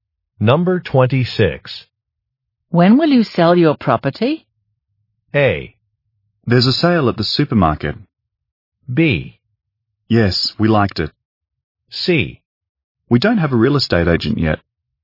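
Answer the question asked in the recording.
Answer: C: We don't have a real estate agent yet.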